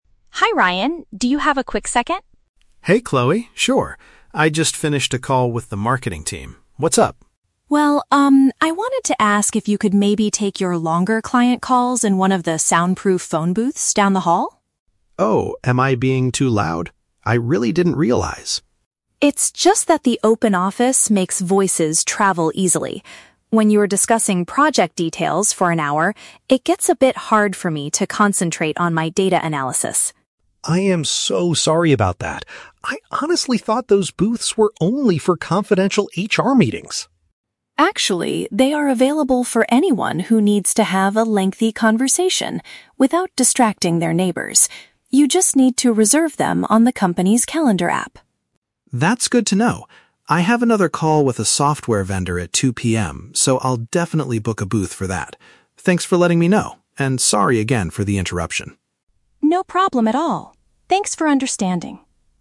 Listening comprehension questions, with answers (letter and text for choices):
Listen to the conversation between two coworkers and choose the correct answer (A, B, or C).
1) Why does Chloe initiate the conversation with Ryan?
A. To complain about the constant noise from the marketing team.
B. To ask him for help with a difficult data analysis project.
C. To request that he move to a different area when speaking to customers.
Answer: C. To request that he move to a different area when speaking to customers.

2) What was Ryan's misunderstanding about the phone booths?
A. He believed they were exclusively for private staff discussions.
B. He thought he had to pay a fee on the calendar app to use them.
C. He assumed they were currently broken and waiting for repairs.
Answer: A. He believed they were exclusively for private staff discussions.

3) What does Ryan promise to do at 2 PM?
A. Meet with the HR department for a confidential discussion.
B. Schedule an isolated space for his upcoming conversation.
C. Go out to a nearby cafe to meet a software vendor in person.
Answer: B. Schedule an isolated space for his upcoming conversation.

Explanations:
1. Chloe asks Ryan to "take your longer client calls in one of the soundproof phone booths." Option C paraphrases this perfectly as requesting him to "move to a different area when speaking to customers." Why the trap is wrong: Option (A) is a trap. Ryan mentions finishing a call with the "marketing team," but Chloe is not complaining about them; she is addressing Ryan's future calls. Option (B) uses the words "data analysis," but she is trying to concentrate on her own work, not asking him for help.
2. Ryan states that he thought the booths were "only for confidential HR meetings." Option A uses synonyms ("exclusively for private staff discussions") to capture this idea. Why the trap is wrong: Option (B) is a trap. The "calendar app" is mentioned by Chloe for making reservations, but there is no mention of paying a "fee." Option (C) is a logical assumption if a facility is not being used, but it is not stated in the audio.
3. Ryan says he has another call at 2 PM and will "book a booth for that." Option B paraphrases "book a booth" as "schedule an isolated space" and "call" as "upcoming conversation." Why the trap is wrong: Option (A) is a trap. "HR meetings" were mentioned earlier as his misunderstanding, but his 2 PM meeting is with a "software vendor," not HR. Option (C) is a trap because he is having a "call" with the vendor, not meeting them "in person" at a cafe.

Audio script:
Chloe: Hi Ryan, do you have a quick second?
Ryan: Hey Chloe, sure. I just finished a call with the marketing team. What's up?
Chloe: Well, um, I wanted to ask if you could maybe take your longer client calls in one of the soundproof phone booths down the hall?
Ryan: Oh, am I being too loud? I really didn't realize.
Chloe: It's just that the open office makes voices travel easily. When you're discussing project details for an hour, it gets a bit hard for me to concentrate on my data analysis.
Ryan: I am so sorry about that. I honestly thought those booths were only for confidential HR meetings.
Chloe: Actually, they are available for anyone who needs to have a lengthy conversation without distracting their neighbors. You just need to reserve them on the company's calendar app.
Ryan: That's good to know. I have another call with a software vendor at 2 PM, so I'll definitely book a booth for that. Thanks for letting me know, and sorry again for the interruption!
Chloe: No problem at all. Thanks for understanding.